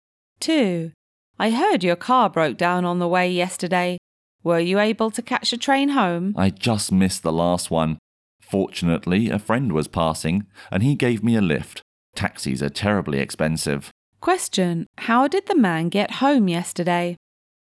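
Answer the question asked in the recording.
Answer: A passing friend gave him a lift.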